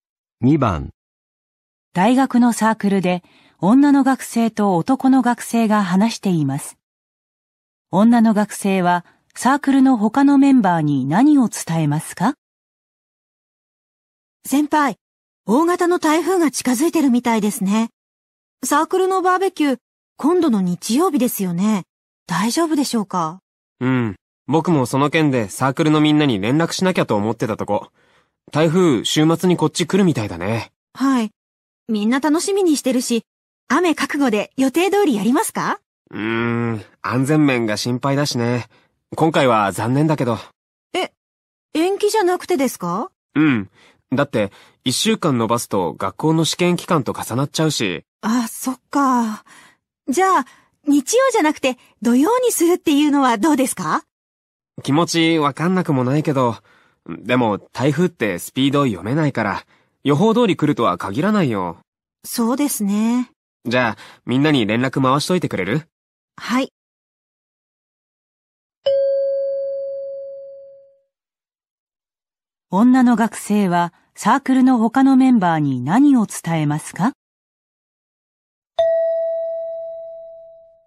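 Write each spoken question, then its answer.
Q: 女の学生はサークルの他のメンバーに何を伝えますか?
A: バーベキューを中止すること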